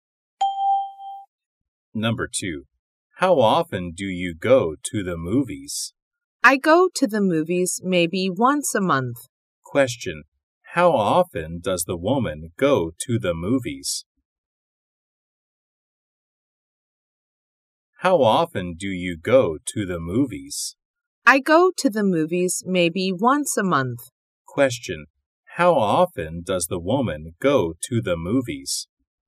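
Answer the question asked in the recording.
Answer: Maybe once a month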